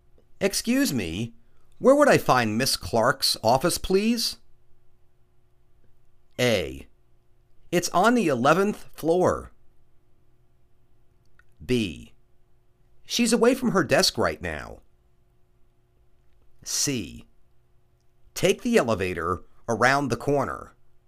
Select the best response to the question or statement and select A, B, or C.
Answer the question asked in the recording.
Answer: It's on the 11 th floor.